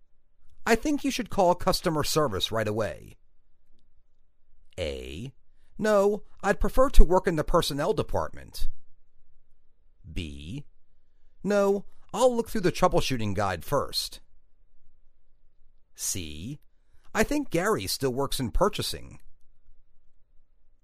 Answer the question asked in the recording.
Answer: No, I'll look through the troubleshooting guide first.